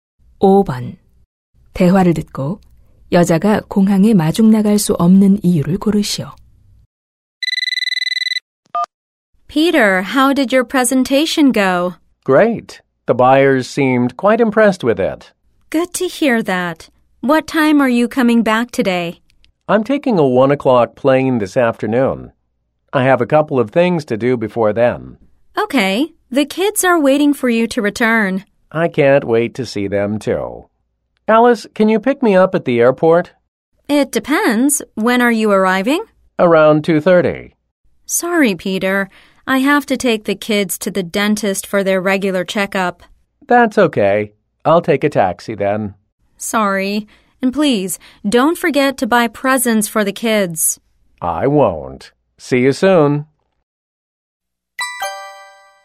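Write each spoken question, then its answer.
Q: 대화를 듣고 여자가 공항에 마중 나갈 수 없는 이유를 고르시오.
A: 아이들을 치과 정기 검진에 데려가야 해서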